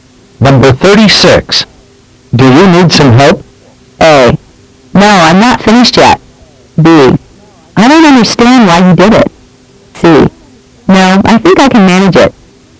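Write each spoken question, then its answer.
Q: Do you need some help?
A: C: No, I think I can manage it.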